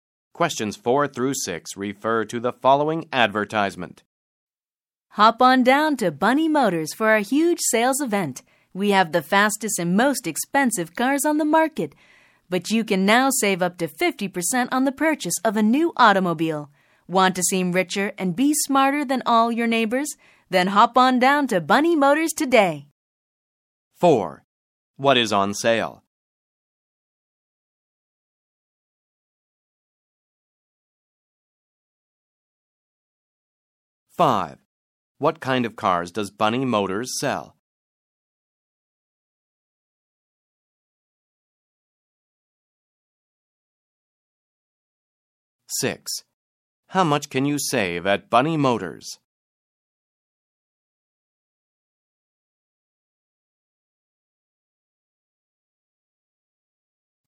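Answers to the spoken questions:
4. New cars (automobiles)
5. The fastest and most expensive cars
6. Up to 50%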